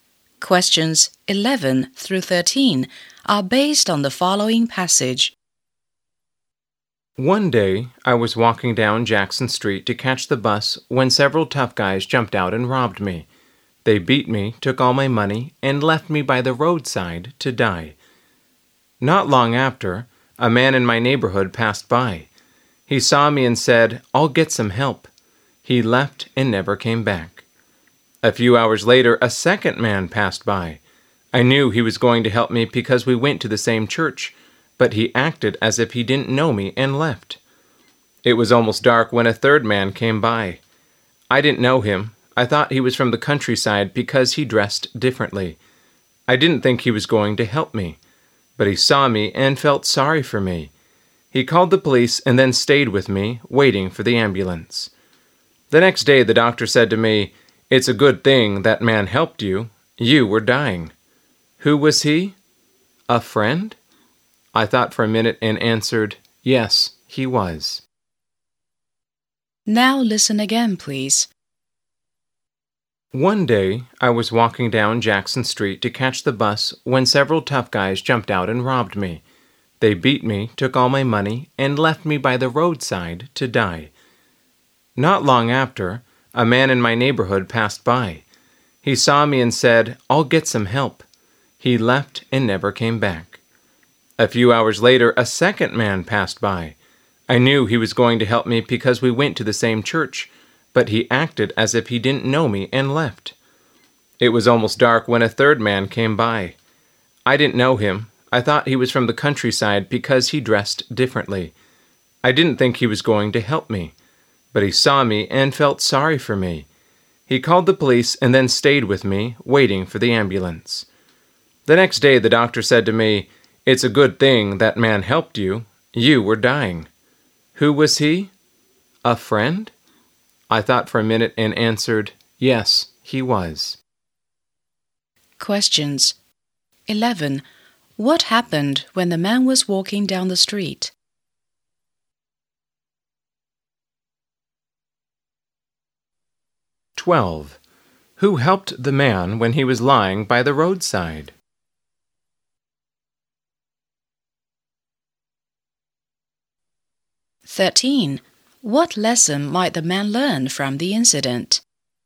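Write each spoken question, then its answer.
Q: What happened when the man was walking down the street?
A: He was robbed and beaten

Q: Who helped the man when he was lying by the roadside?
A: A stranger who seemed to be from the countryside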